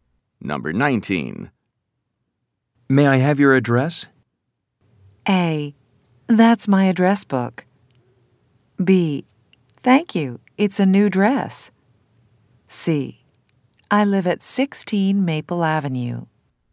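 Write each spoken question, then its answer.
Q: May I have your address?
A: C: I live at 16 Maple Avenue.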